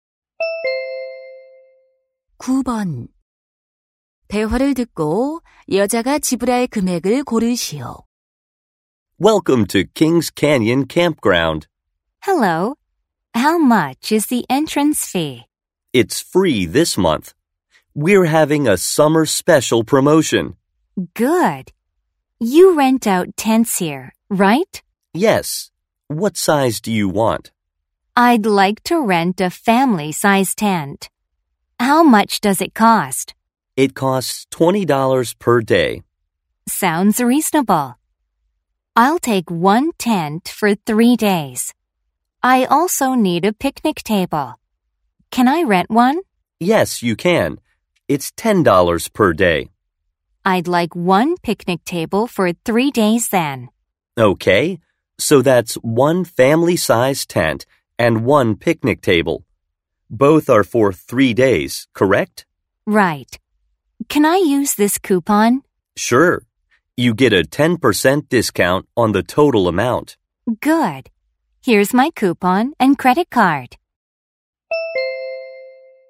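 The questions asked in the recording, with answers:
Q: 대화를 듣고 여자가 지불할 금액을 고르시오.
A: $81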